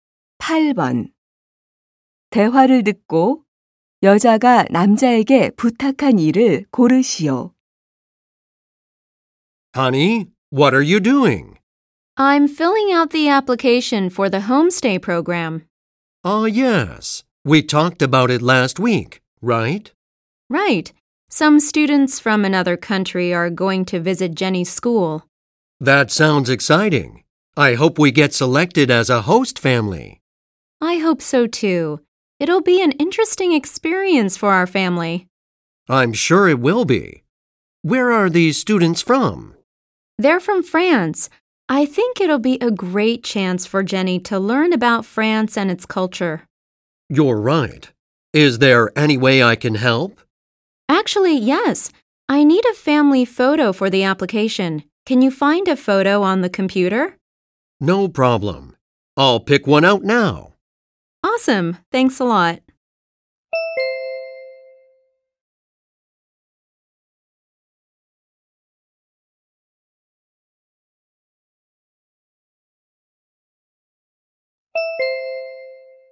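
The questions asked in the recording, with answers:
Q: 대화를 듣고 여자가 남자에게 부탁한 일을 고르시오.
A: 컴퓨터에서 가족사진 찾기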